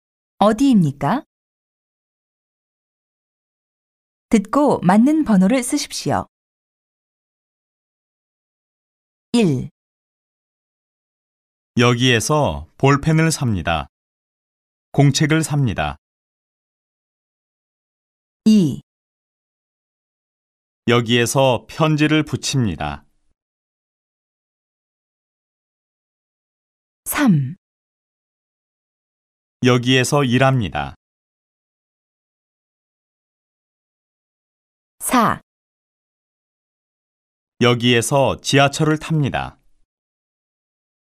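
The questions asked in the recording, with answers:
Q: 어디입니까?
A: 문구점

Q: 어디입니까?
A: 우체국

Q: 어디입니까?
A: 지하철역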